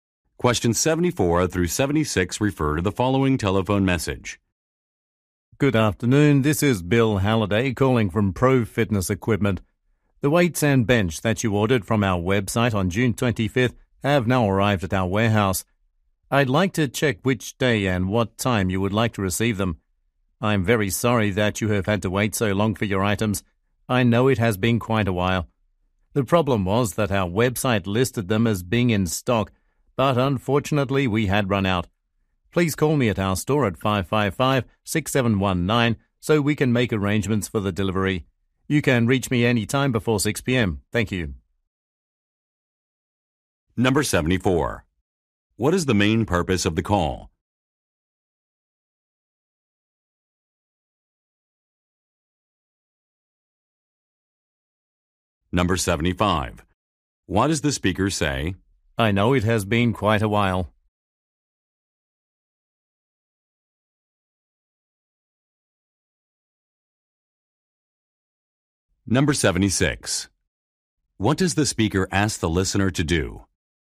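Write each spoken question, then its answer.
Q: What is the main purpose of the call?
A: To arrange a delivery time for ordered items

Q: What does the speaker ask the listener to do?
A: Call him at the store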